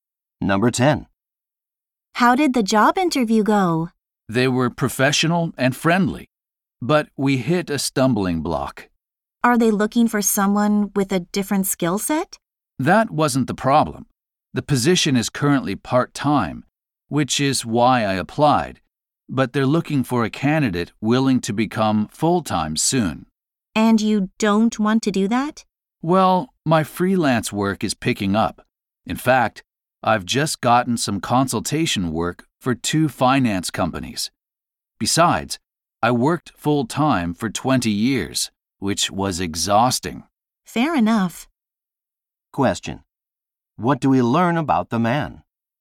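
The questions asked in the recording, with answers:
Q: What do we learn about the man?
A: He does not want to work full-time; his freelance work is growing.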